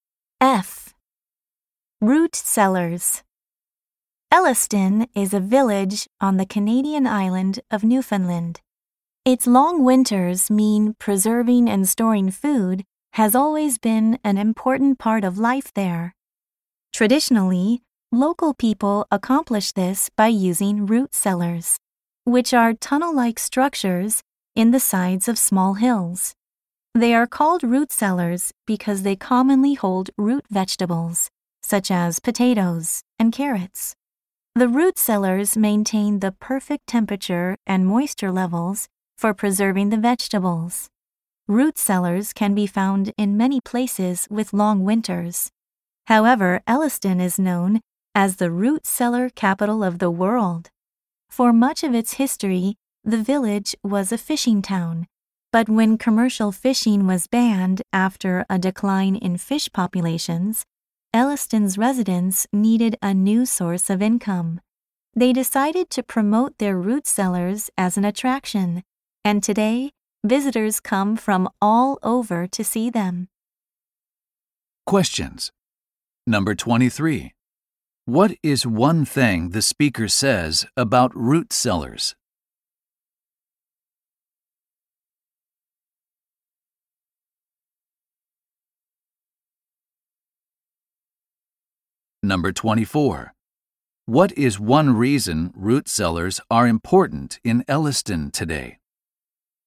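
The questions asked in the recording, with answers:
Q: What is one reason root cellars are important in Elliston today?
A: They attract visitors, giving income after fishing was banned.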